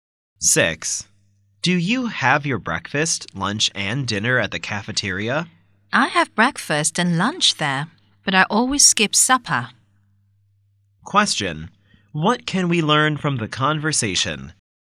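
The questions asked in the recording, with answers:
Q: What can we learn from the conversation?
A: The speaker never has supper.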